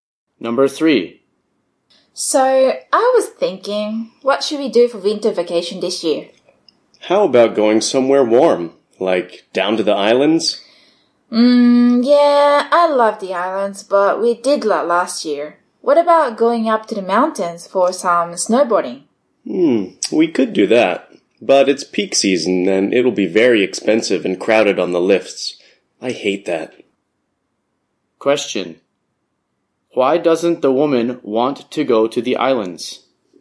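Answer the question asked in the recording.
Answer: They went there last year.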